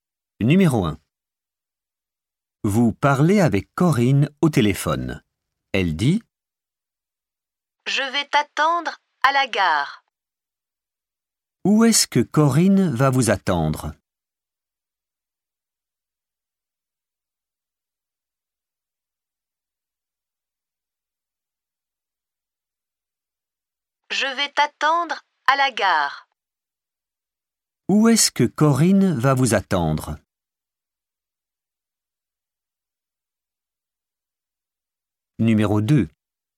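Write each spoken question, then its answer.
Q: Où est-ce que Corinne va vous attendre ?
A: À la gare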